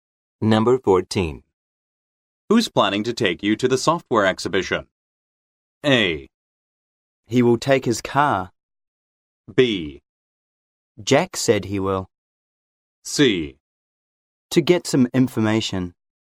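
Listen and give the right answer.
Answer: B: Jack said he will.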